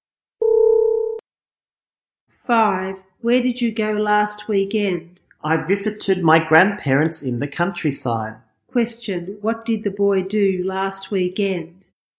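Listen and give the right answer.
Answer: He visited his grandparents in the countryside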